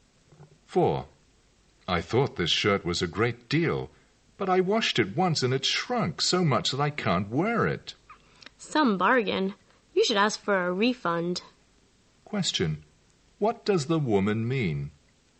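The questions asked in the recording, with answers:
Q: What does the woman mean?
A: The shirt was not a bargain; he should get a refund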